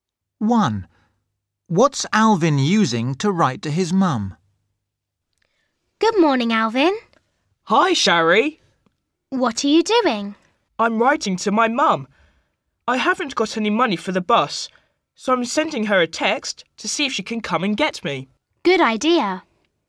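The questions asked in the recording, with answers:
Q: What's Alvin using to write to his mum?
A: a mobile phone (sending a text)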